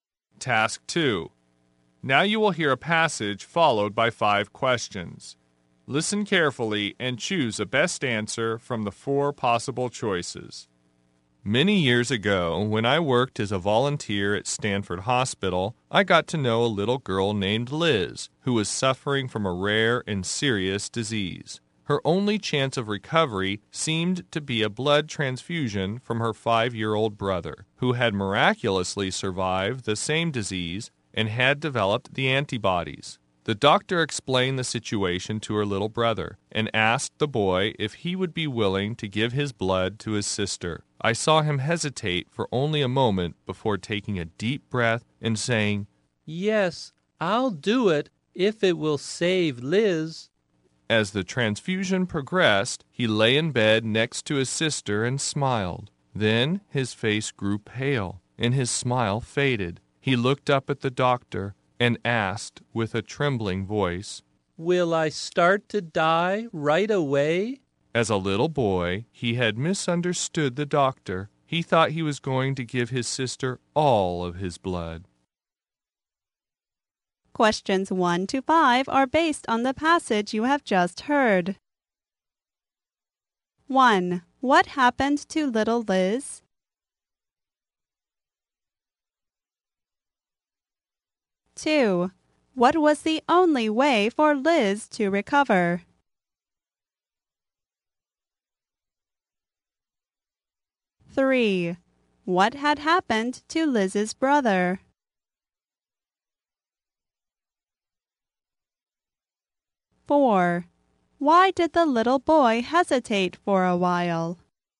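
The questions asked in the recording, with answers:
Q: What happened to little Liz?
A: She was suffering from a rare and serious disease

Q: What was the only way for Liz to recover?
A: A blood transfusion from her brother

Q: What had happened to Liz's brother?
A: He had survived the same disease and developed antibodies

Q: Why did the little boy hesitate for a while?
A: He thought he would have to give all his blood and die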